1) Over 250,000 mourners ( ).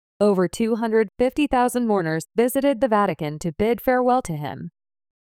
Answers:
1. visited the Vatican to bid farewell to him

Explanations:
▶ 「the Vatican」の定冠詞を落として「Vatican」と書いてしまった。 ⇒ 定冠詞「the」は弱く発音されるため、直前の動詞の過去形「visited」の語尾と混同しやすい箇所です。

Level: 中級脱出